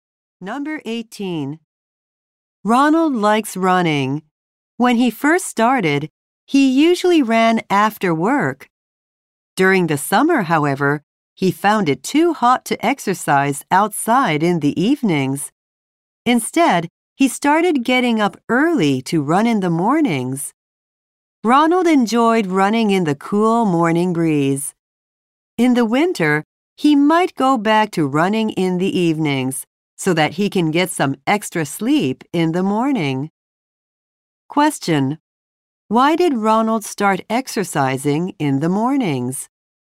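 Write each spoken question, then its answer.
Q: Why did Ronald start exercising in the mornings?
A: It was too hot to run in the summer evenings.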